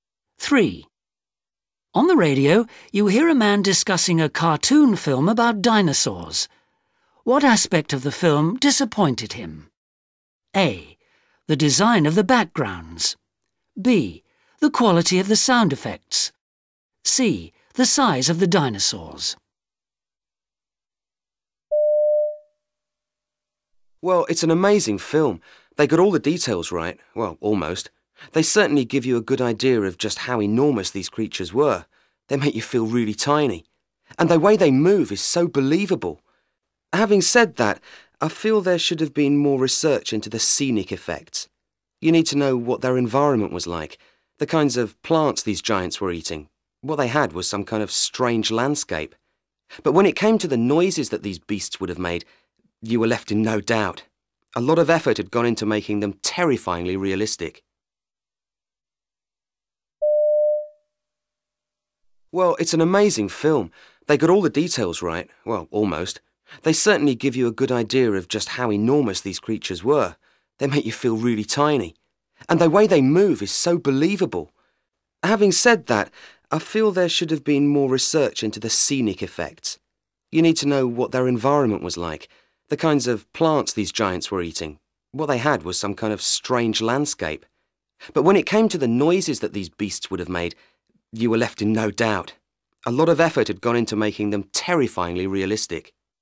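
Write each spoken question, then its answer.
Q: What aspect of the film disappointed him?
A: A: The design of the backgrounds.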